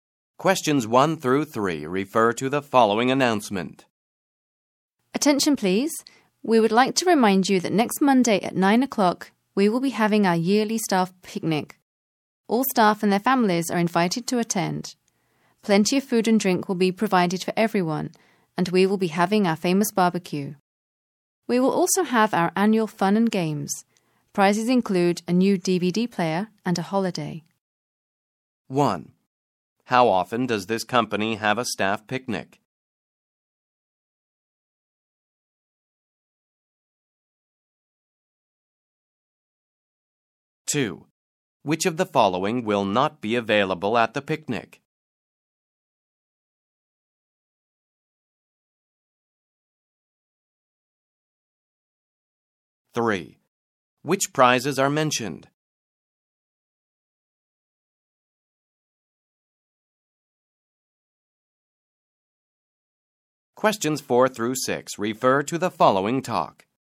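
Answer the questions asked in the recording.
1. Once a year
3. A new DVD player and a holiday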